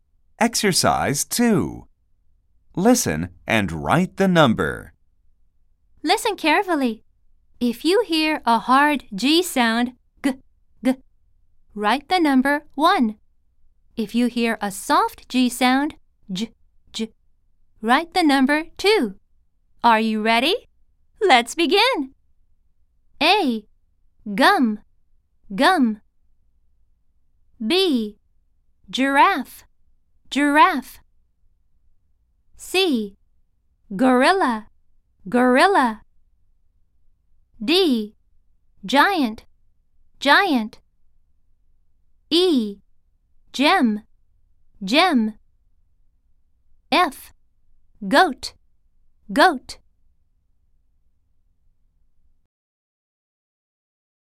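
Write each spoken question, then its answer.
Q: A. Gum, gum.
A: 1 (hard G)

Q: B. Giraffe, giraffe.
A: 2 (soft G)

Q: C. Gorilla, gorilla.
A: 1 (hard G)

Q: D. Giant, giant.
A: 2 (soft G)

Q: E. Gem, gem.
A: 2 (soft G)

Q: F. Goat, goat.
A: 1 (hard G)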